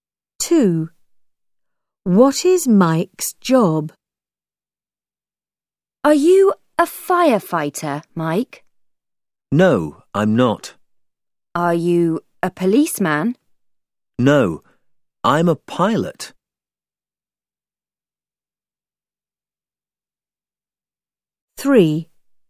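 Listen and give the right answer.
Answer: a pilot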